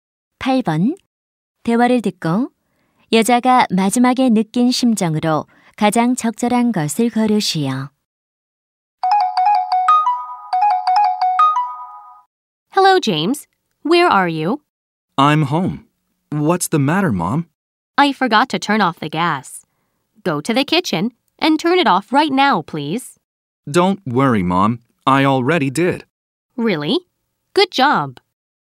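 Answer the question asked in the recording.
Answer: 안도함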